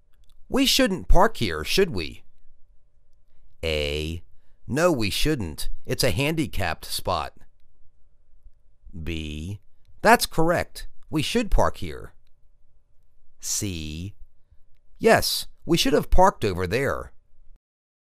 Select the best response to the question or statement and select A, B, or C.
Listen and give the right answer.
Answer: No we shouldn't. It's a handicapped spot.